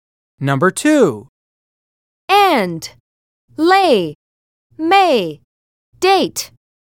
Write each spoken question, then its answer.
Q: And, lay, may, date.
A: Letter S is correct.